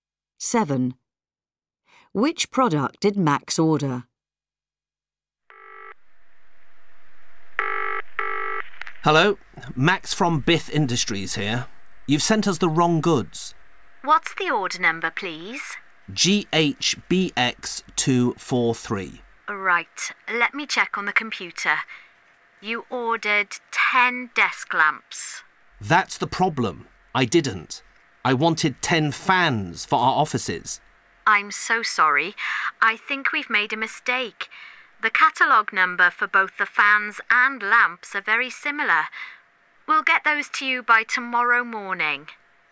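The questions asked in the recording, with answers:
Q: Which product did Max order?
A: Fans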